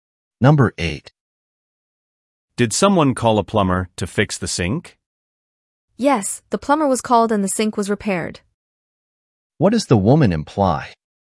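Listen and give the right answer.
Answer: The sink has been fixed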